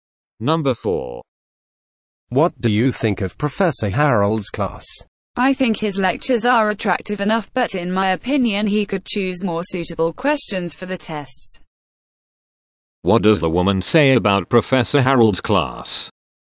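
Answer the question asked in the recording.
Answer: The lectures are good, but the test questions could be more suitable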